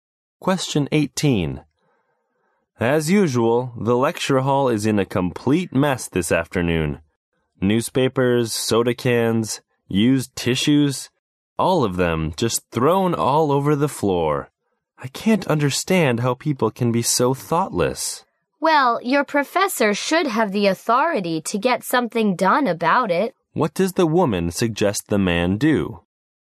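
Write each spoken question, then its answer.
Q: What does the woman suggest the man do?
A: Talk to his professor about the problem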